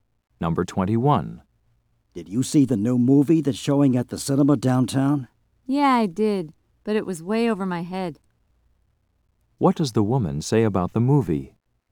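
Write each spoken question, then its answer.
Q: What does the woman say about the movie?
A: She didn't understand it.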